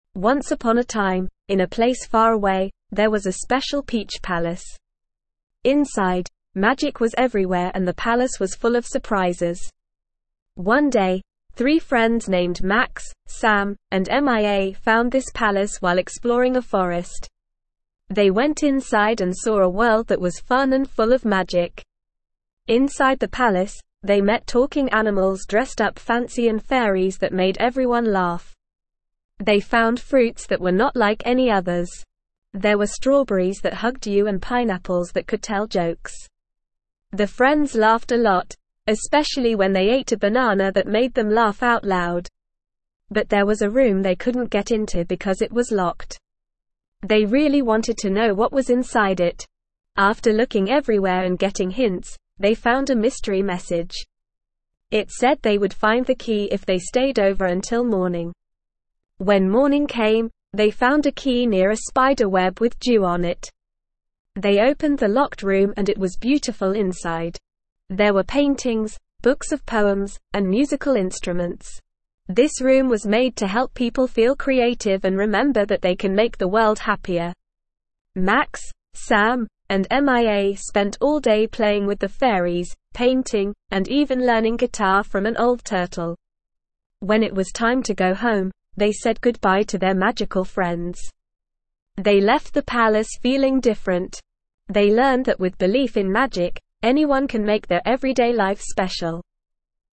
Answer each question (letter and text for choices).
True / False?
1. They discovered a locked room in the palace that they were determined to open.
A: True

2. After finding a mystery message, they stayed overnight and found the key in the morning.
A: True

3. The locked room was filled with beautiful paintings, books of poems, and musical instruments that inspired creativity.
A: True

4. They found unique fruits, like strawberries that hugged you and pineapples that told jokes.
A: True

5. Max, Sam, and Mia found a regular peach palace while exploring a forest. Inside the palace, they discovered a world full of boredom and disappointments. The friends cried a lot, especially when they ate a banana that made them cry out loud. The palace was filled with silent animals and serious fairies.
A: False

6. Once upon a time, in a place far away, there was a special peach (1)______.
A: palace

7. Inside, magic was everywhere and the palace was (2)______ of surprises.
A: full

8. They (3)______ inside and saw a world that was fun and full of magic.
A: went

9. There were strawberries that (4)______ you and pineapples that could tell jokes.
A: hugged

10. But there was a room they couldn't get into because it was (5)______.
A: locked

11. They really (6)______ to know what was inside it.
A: wanted

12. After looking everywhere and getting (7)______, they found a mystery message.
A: hints

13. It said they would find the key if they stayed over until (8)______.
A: morning

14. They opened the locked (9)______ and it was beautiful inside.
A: room

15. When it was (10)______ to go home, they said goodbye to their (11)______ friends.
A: time

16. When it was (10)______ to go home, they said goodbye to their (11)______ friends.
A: magical

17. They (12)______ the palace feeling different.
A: left

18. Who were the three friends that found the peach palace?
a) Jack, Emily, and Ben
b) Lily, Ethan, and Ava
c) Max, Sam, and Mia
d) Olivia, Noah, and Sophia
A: c) Max, Sam, and Mia

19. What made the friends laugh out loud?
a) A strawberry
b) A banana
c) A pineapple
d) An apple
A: b) A banana

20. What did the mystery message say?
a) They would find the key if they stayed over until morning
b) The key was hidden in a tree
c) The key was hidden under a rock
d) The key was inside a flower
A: a) They would find the key if they stayed over until morning

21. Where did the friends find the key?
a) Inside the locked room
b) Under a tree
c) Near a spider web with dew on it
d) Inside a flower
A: c) Near a spider web with dew on it

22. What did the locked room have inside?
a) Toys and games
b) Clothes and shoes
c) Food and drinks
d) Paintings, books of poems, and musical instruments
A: d) Paintings, books of poems, and musical instruments

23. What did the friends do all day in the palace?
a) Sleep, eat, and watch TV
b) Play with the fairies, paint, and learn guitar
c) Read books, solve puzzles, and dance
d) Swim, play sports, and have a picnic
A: b) Play with the fairies, paint, and learn guitar

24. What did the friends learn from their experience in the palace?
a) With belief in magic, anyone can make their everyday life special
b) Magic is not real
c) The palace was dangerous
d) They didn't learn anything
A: a) With belief in magic, anyone can make their everyday life special

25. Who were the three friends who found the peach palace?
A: Max, Sam, and Mia.

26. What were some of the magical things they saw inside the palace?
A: Talking animals, fairies, and fruits that had special abilities like hugging and telling jokes.

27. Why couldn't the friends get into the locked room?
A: The locked room needed a key to open it.

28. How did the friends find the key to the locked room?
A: They found a mystery message that told them they would find the key if they stayed overnight.

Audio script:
Once upon a time, in a place far away, there was a special peach palace. Inside, magic was everywhere and the palace was full of surprises. One day, three friends named Max, Sam, and Mia found this palace while exploring a forest. They went inside and saw a world that was fun and full of magic.
Inside the palace, they met talking animals dressed up fancy and fairies that made everyone laugh. They found fruits that were not like any others. There were strawberries that hugged you and pineapples that could tell jokes. The friends laughed a lot, especially when they ate a banana that made them laugh out loud.
But there was a room they couldn't get into because it was locked. They really wanted to know what was inside it. After looking everywhere and getting hints, they found a mystery message. It said they would find the key if they stayed over until morning.
When morning came, they found a key near a spider web with dew on it. They opened the locked room and it was beautiful inside. There were paintings, books of poems, and musical instruments. This room was made to help people feel creative and remember that they can make the world happier.
Max, Sam, and Mia spent all day playing with the fairies, painting, and even learning guitar from an old turtle. When it was time to go home, they said goodbye to their magical friends. They left the palace feeling different. They learned that with belief in magic, anyone can make their everyday life special.

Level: Level 2